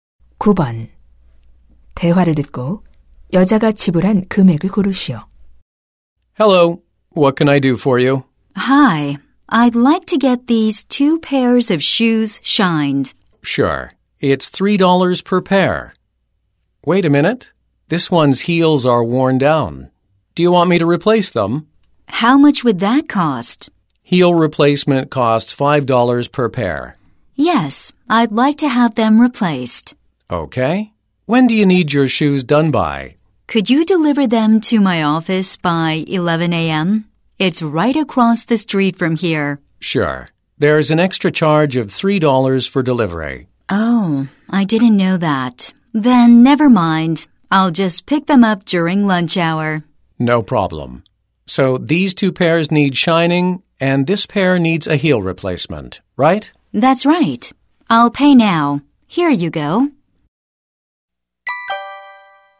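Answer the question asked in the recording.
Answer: $11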